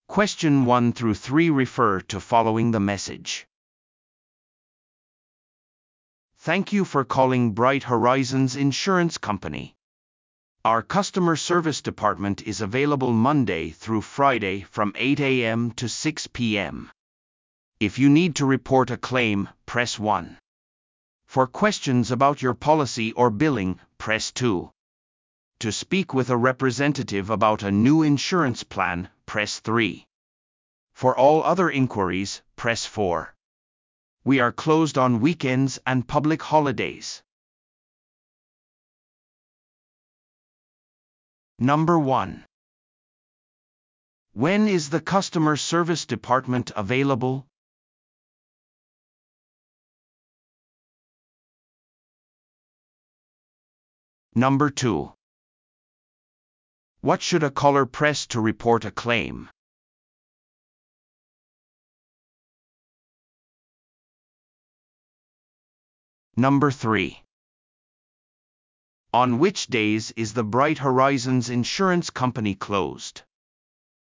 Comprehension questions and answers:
Listen to the audio below and answer the questions.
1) When is the customer service department available?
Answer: From 8:00 AM to 6:00 PM, Monday through Friday

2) What should a caller press to report a claim?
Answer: Press 1

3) On which days is the Bright Horizons Insurance Company closed?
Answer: On weekends and public holidays

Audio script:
"Thank you for calling Bright Horizons Insurance Company. Our customer service department is available Monday through Friday from 8:00 AM to 6:00 PM. If you need to report a claim, press 1. For questions about your policy or billing, press 2. To speak with a representative about a new insurance plan, press 3. For all other inquiries, press 4. We are closed on weekends and public holidays."